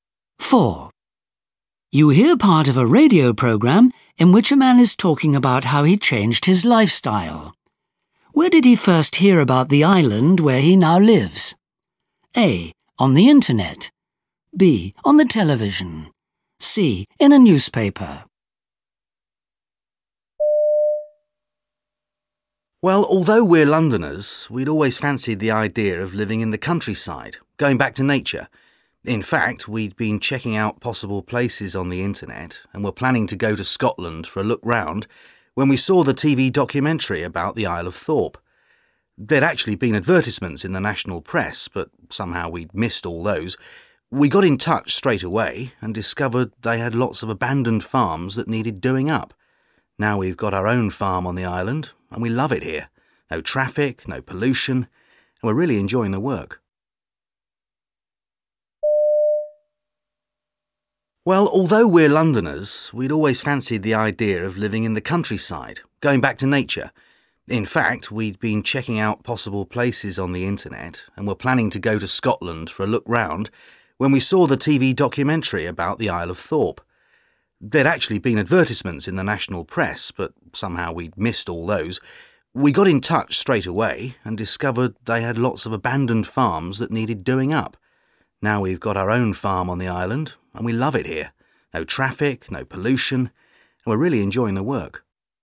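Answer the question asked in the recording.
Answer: B: On the television.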